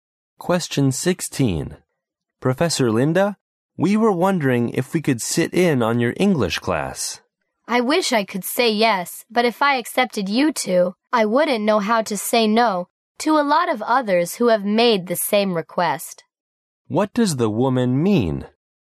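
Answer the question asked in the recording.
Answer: She can't let them sit in on her class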